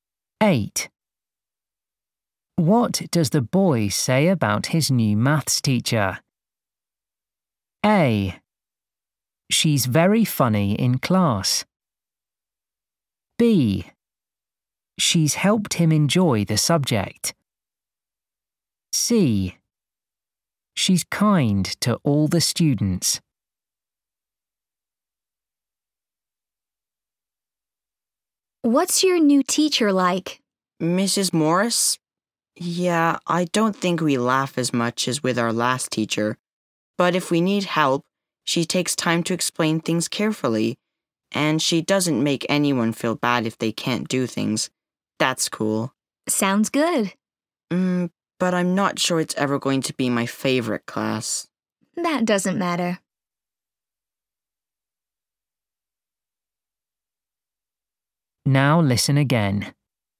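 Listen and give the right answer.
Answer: C: She's kind to all the students.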